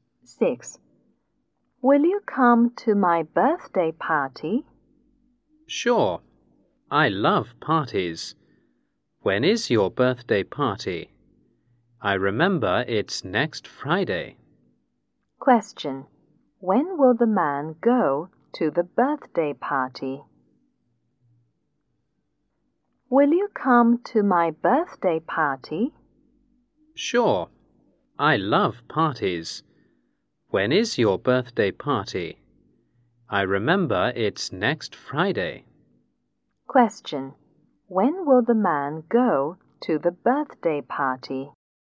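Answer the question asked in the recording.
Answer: Next Friday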